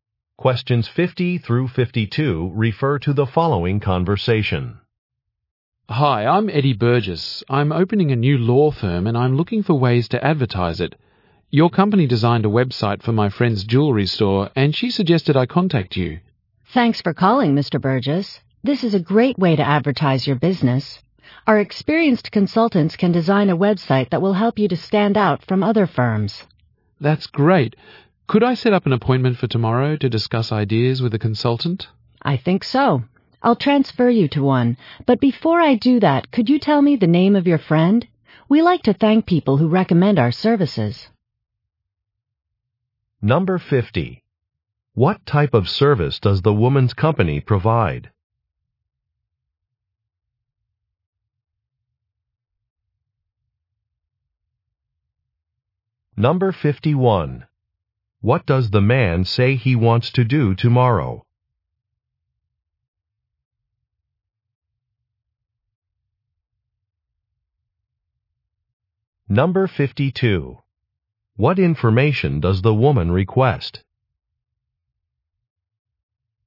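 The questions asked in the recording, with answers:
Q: What type of service does the woman's company provide?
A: Website design

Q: What does the man say he wants to do tomorrow?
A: Meet a consultant to discuss ideas

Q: What information does the woman request?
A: The name of his friend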